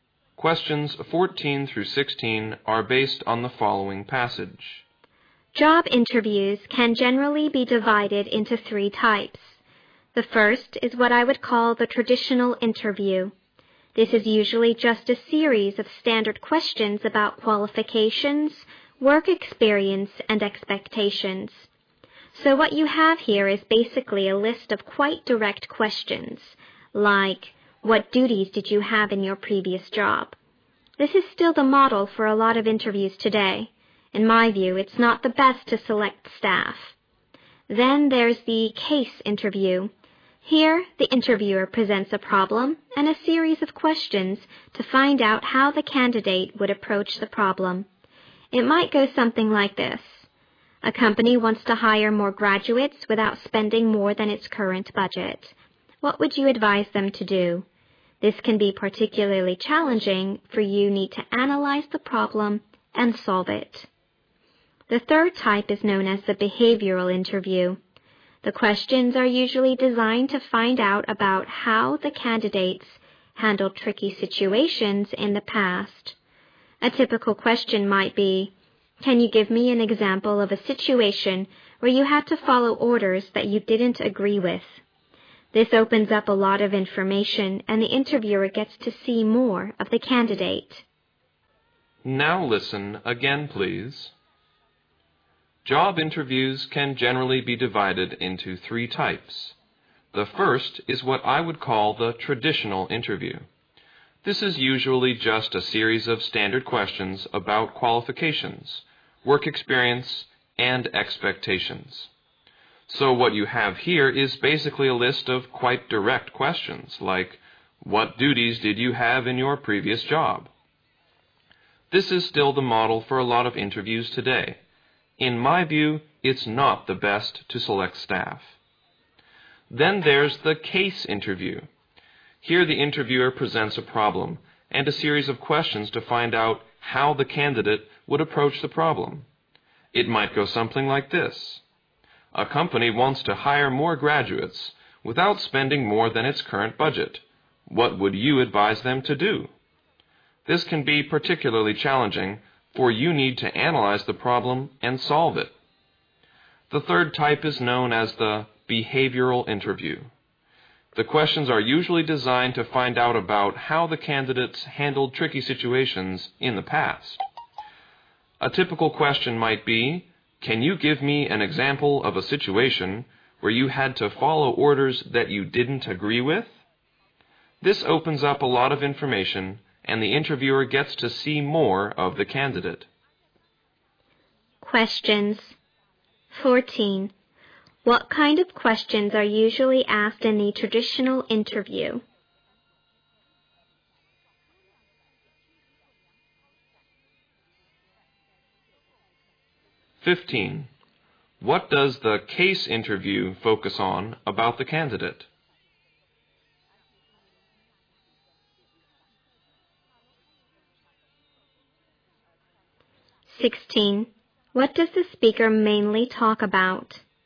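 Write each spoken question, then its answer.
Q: What kind of questions are usually asked in the traditional interview?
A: Standard, direct questions about qualifications, work experience and expectations.

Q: What does the case interview focus on about the candidate?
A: How the candidate approaches, analyzes and solves a problem.

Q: What does the speaker mainly talk about?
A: Three types of job interviews.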